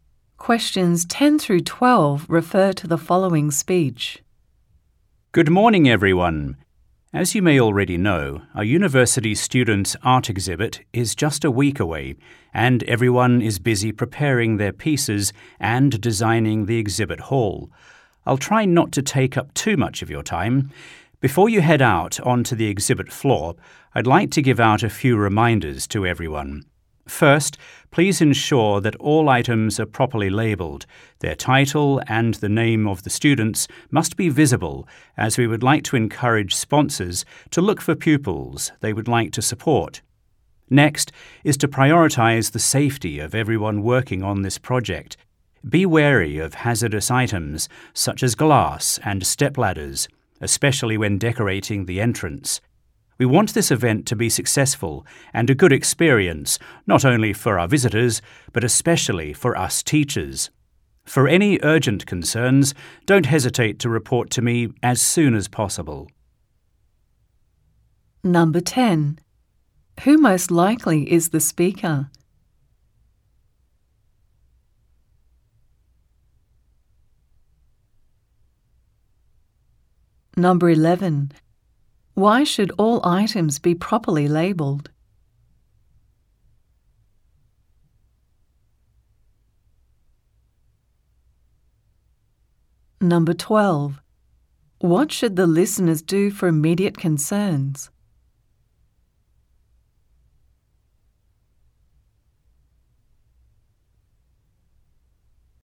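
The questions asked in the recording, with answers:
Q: Why should all items be properly labelled?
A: So sponsors can find students they would like to support

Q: What should the listeners do for immediate concerns?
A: Report to the speaker as soon as possible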